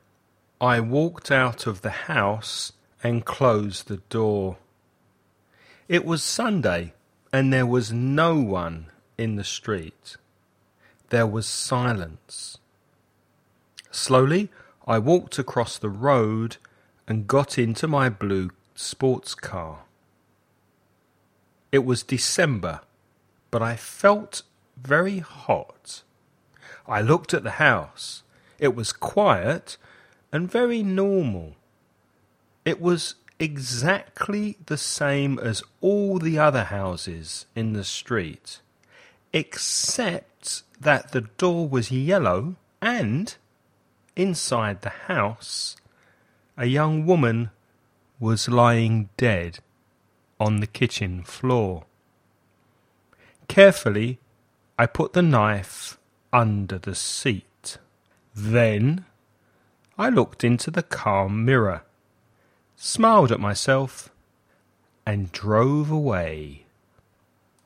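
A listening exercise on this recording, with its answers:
Escucha el audio y completa el ejercicio.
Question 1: What day of the week was it?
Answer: Sunday

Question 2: What kind of car did the man have?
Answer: A blue sports car

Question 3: Which month of the year was it?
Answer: December

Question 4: What colour was the door of the house?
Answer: Yellow

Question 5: What did the man put under the car seat?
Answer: A knife

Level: nivel básico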